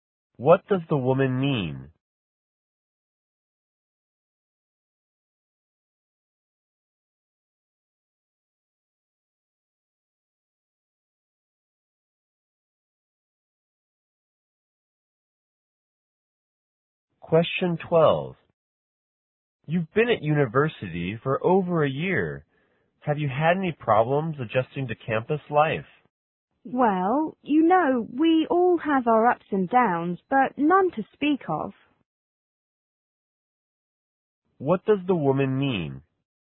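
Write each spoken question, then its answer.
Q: What does the woman mean?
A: She hasn't had any serious problems adjusting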